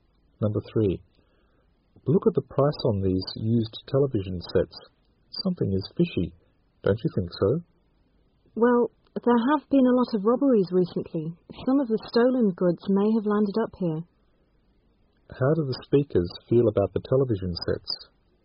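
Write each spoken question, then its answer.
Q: How do the speakers feel about the television sets?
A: Suspicious; they think the sets may be stolen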